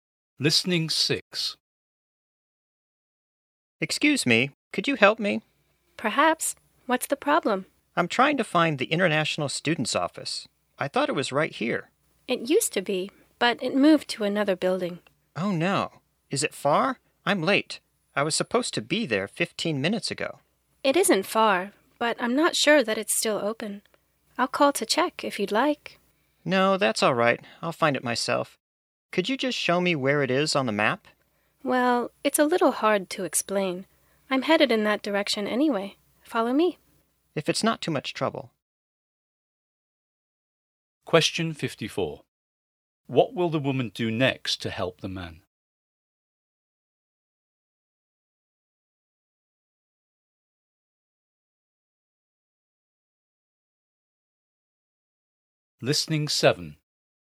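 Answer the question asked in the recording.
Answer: Take him to the International Students' Office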